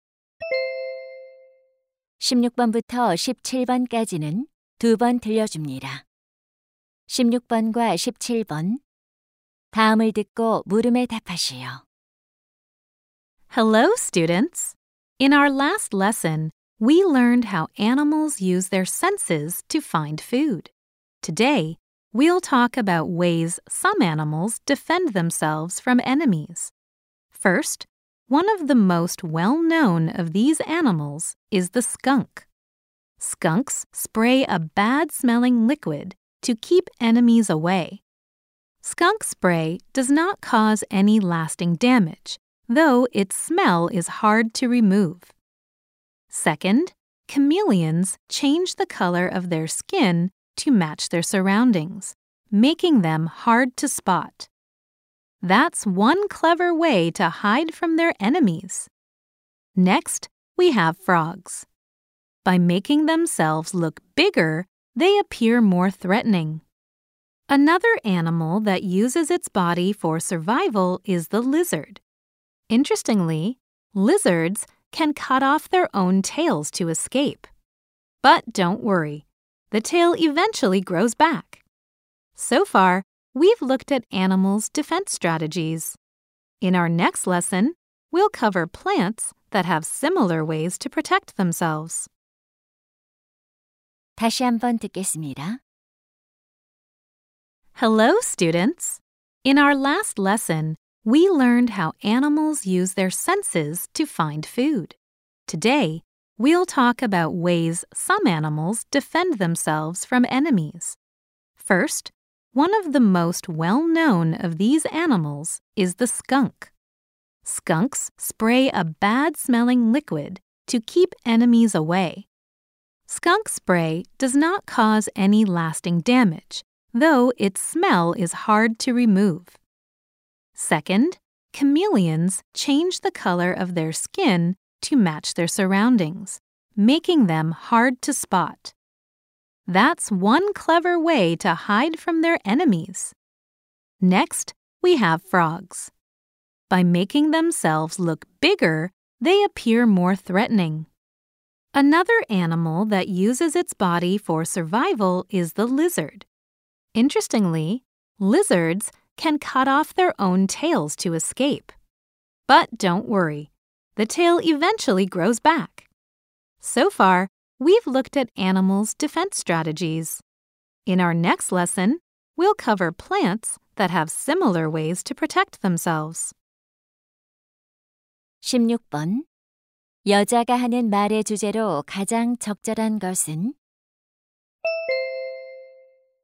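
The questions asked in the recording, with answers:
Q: 여자가 하는 말의 주제로 가장 적절한 것은?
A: 동물들이 적으로부터 자신을 방어하는 방법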